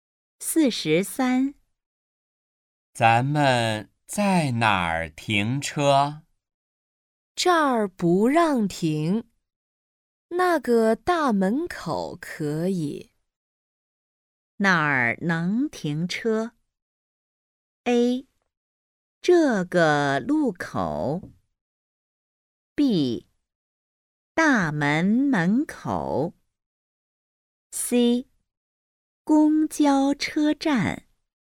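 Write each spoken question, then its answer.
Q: 哪儿能停车?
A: B: 大门门口。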